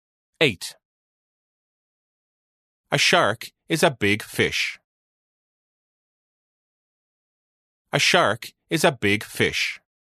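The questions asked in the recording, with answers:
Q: A shark is a big fish.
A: True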